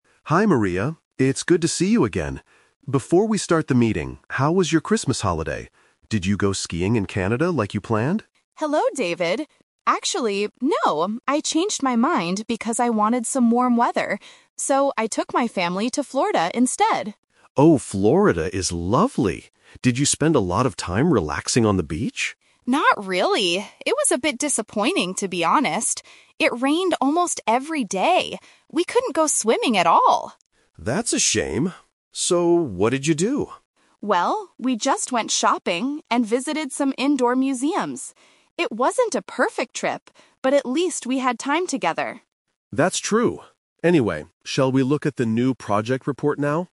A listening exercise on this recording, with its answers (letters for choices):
Listen to a conversation between two business partners, David and Maria, before their meeting. Choose the correct answer (A, B, or C) for each question.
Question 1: Where did Maria go for her Christmas holiday?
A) To Canada.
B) To Florida.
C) To her hometown.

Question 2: Why didn't Maria spend time on the beach?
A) Because the weather was very wet.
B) Because it was freezing and snowy.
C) Because she doesn't like swimming.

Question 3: What did Maria and her family do during the trip?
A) They went skiing in the mountains.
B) They stayed inside their hotel room.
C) They bought things and saw indoor attractions.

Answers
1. B
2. A
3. C

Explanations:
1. Maria says, "So, I took my family to Florida instead." Option (A) is a trap because David asks if she went to Canada, but she says "Actually, no." Option (C) is not mentioned.
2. Maria explains that "It rained almost every day!" Option (A) uses "wet" to paraphrase rainy. Option (B) is a trap related to the cold weather in Canada (her original plan). Option (C) is a plausible reason, but not true for Maria.
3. Maria states that they "went shopping and visited some indoor museums." Option (C) paraphrases this perfectly ("bought things" = shopping, "indoor attractions" = indoor museums). Option (A) is the trap based on Canada. Option (B) is a trap; she mentions being indoors, but at museums/shops, not staying in the hotel room.

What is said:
David: Hi, Maria. It's good to see you again. Before we start the meeting, how was your Christmas holiday? Did you go skiing in Canada like you planned?
Maria: Hello, David. Actually, no. I changed my mind because I wanted some warm weather. So, I took my family to Florida instead.
David: Oh, Florida is lovely! Did you spend a lot of time relaxing on the beach?
Maria: Not really. It was a bit disappointing, to be honest. It rained almost every day! We couldn't go swimming at all.
David: That's a shame. So, what did you do?
Maria: Well, we just went shopping and visited some indoor museums. It wasn't a perfect trip, but at least we had time together.